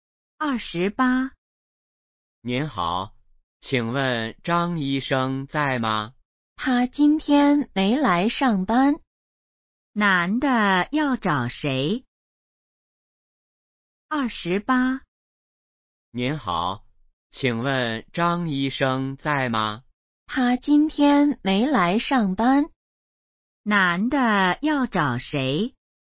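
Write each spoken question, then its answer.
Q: 男的要找谁?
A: 张医生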